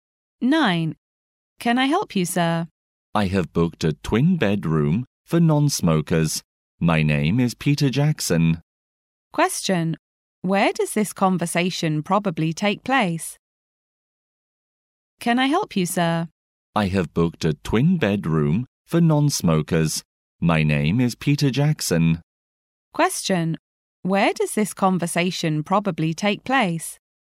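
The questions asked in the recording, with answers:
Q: Where does this conversation probably take place?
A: In a hotel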